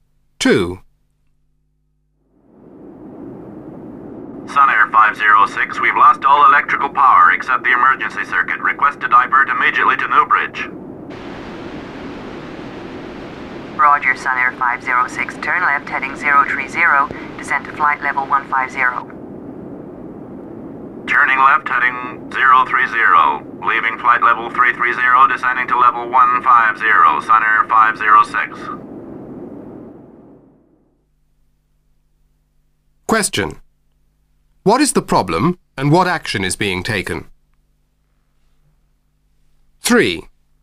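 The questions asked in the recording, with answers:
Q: What is the problem and what action is being taken?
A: Loss of all electrical power except the emergency circuit; diverting to Newbridge, turning left heading 030 and descending to flight level 150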